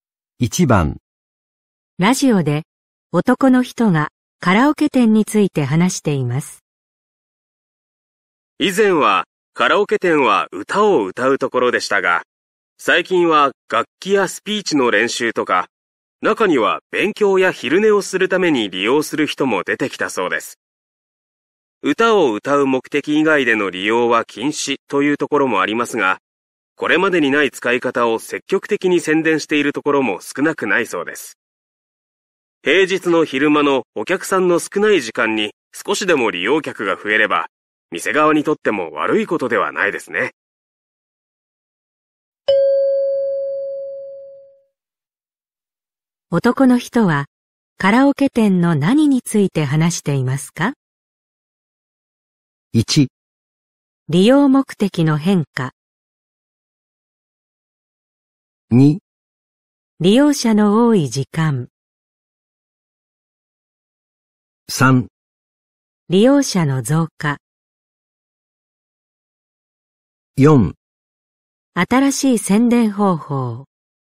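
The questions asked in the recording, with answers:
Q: 男の人はカラオケ店の何について話していますか?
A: 1: 利用目的の変化。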